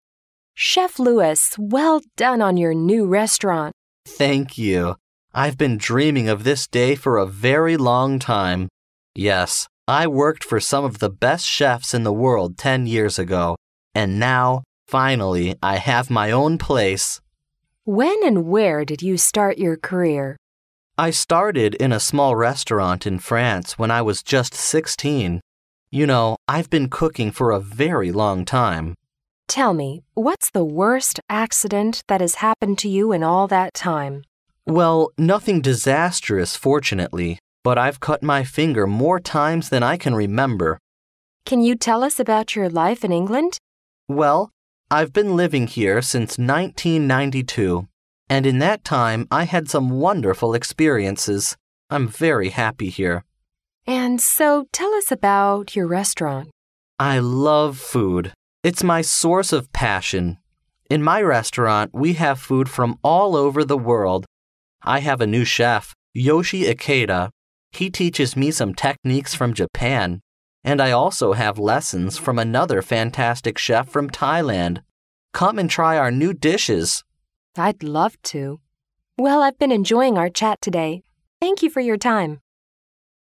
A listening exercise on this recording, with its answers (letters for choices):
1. What's the most probable relationship between the man and the woman?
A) Interviewer and chef.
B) Customer and chef.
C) Baker and chef.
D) Manger and customer.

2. Who did Louis work for ten years ago?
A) Chef Yoshi Ikeda from Japan.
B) Some of the best chefs in the world.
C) A chef from Thailand.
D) Some chefs from Europe.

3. What's the worst accident that has happened to him in all that time?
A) Cutting his fingers.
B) Burning his arms.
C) Gas explosion.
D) Making mistakes in kitchen.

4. What kind of food is there in Louis's restaurant?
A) Food from European countries.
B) Food from Asian countries.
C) Food from all over the world.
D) Food from the local area.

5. How long has Louis been living in England?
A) Since 1990.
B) Since 1992.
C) Since 1982.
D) Since 1980.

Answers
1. A
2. B
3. A
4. C
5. B

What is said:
W: Chef Louis, well done on your new restaurant!
M: Thank you. I've been dreaming of this day for a very long time. Yes, I worked for some of the best chefs in the world ten years ago. And now, finally, I have my own place.
W: When and where did you start your career?
M: I started in a small restaurant in France when I was just sixteen. You know I've been cooking for a very long time.
W: Tell me: what's the worst accident that has happened to you in all that time?
M: Well, nothing disastrous fortunately, but I've cut my finger more times than I can remember!
W: Can you tell us about your life in England?
M: Well, I've been living here since 1992. And in that time I had some wonderful experiences. I'm very happy here.
W: And so tell us about your restaurant.
M: I love food. It's my source of passion. In my restaurant we have food from all over the world. I have a new chef, Yoshi Ikeda. He teaches me some techniques from Japan. And I also have lessons from another fantastic chef from Thailand. Come and try our new dishes!
W: I'd love to. Well, I've been enjoying our chat today. Thank you for your time.